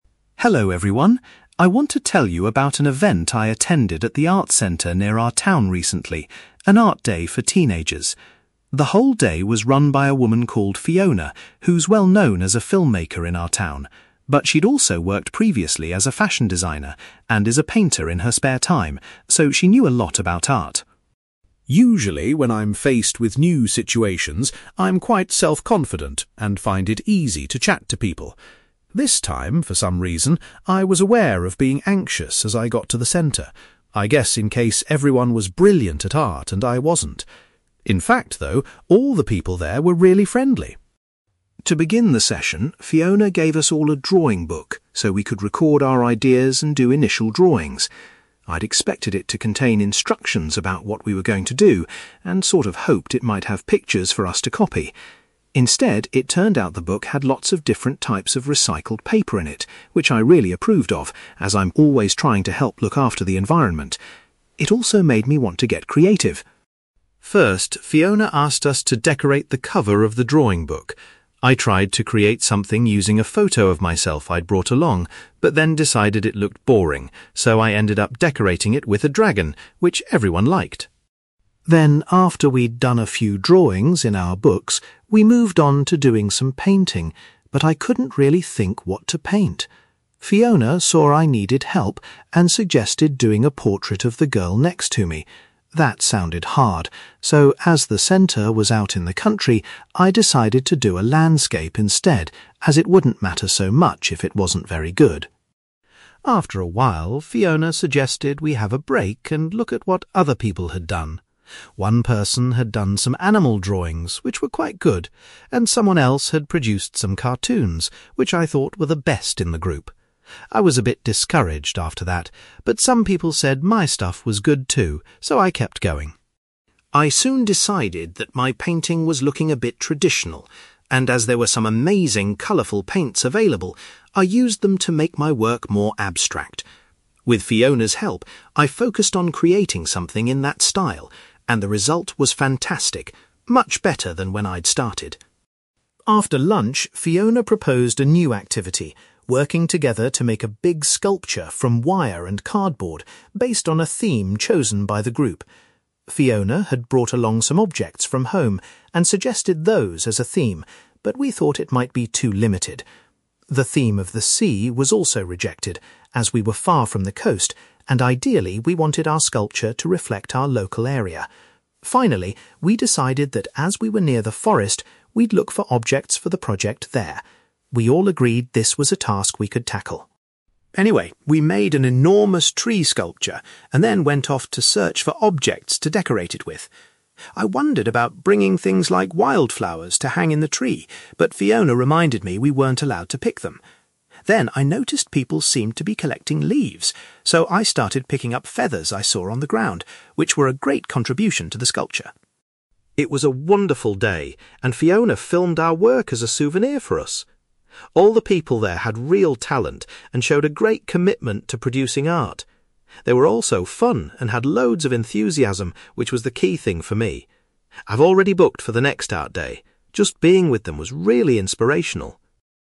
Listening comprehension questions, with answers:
You will hear a boy called Harry telling his class about an art event he took part in recently. For questions 9-18, complete the sentences with a word or short phrase.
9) Fiona, the person running the art day, had once worked as a (9)........................... .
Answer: (fashion) designer

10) Harry uses the word (10)........................... to describe his feelings when he first arrived.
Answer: anxious

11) Harry was inspired by the variety of (11)........................... paper in the drawing book he was given.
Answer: recycled

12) Harry put a (12)........................... on the cover of his drawing book.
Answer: dragon

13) Harry first painting was a (13)........................... .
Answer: landscape

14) Harry was particularly impressed by the (14)........................... that another student had done.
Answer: cartoons

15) With Fiona's help, Harry attempted a more (15)........................... style of drawing than he's tried when he started.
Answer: abstract

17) Harry found a collection of (17)........................... to include in the sculpture.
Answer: feathers

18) The (18)........................... of the art group was what made Harry decide to sign up for the next session.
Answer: enthusiasm

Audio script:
Harry: Hello, everyone. I want to tell you about an event I attended at the art centre near our town recently - an art day for teenagers! The whole day was run by a woman called Fiona, who's well-known as a filmmaker in our town. But she'd also worked previously as a fashion designer, and is a painter in her spare time, so she knew a lot about art.
Usually when I'm faced with new situations, I'm quite self-confident, and find it easy to chat to people. This time, for some reason, I was aware of being anxious as I got to the centre - I guess in case everyone was brilliant at art, and I wasn't! In fact, though, all the people there were really friendly!
To begin the session, Fiona gave us all a drawing book, so we could record our ideas and do initial drawings. I'd expected it to contain instructions about what we were going to do - and sort of hoped it might have pictures for us to copy! Instead, it turned out the book had lots of different types of recycled paper in it, which I really approved of, as I'm always trying to help look after the environment. It also made me want to get creative!
First, Fiona asked us to decorate the cover of the drawing book. I tried to create something using a photo of myself I'd brought along, but then decided it looked boring, so I ended up decorating it with a dragon - which everyone liked!
Then after we'd done a few drawings in our books, we moved on to doing some painting - but I couldn't really think what to paint. Fiona saw I needed help, and suggested doing a portrait of the girl next to me. That sounded hard - so, as the centre was out in the country, I decided to do a landscape instead, as it wouldn't matter so much if it wasn't very good!
After a while, Fiona suggested we have a break and look at what other people had done. One person had done some animal drawings, which were quite good, and someone else had produced some cartoons, which I thought were the best in the group. I was a bit discouraged after that, but some people said my stuff was good, too, so I kept going!
I soon decided that my painting was looking a bit traditional, and as there were some amazing colourful paints available, I used them to make my work more abstract. With Fiona's help, I focused on creating something in that style, and the result was fantastic - much better than when I'd started.
After lunch, Fiona proposed a new activity - working together to make a big sculpture from wire and cardboard based on a theme chosen by the group. Fiona had brought along some objects from home, and suggested those as a theme - but we thought it might be too limited. The theme of the sea was also rejected, as we were far from the coast and ideally we wanted our sculpture to reflect our local area. Finally we decided that as we were near the forest, we'd look for objects for the project there. We all agreed this was a task we could tackle.
Anyway, we made an enormous tree sculpture, and then went off to search for objects to decorate it with. I wondered about bringing things like wild flowers to hang in the tree, but Fiona reminded me we weren't allowed to pick them. Then I noticed people seemed to be collecting leaves, so I started picking up feathers I saw on the ground, which were a great contribution to the sculpture!
It was a wonderful day - and Fiona filmed our work as a souvenir for us! All the people there had real talent, and showed a great commitment to producing art. They were also fun and had loads of enthusiasm, which was the key thing for me. I've already booked for the next art day - just being with them was really inspirational!

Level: B2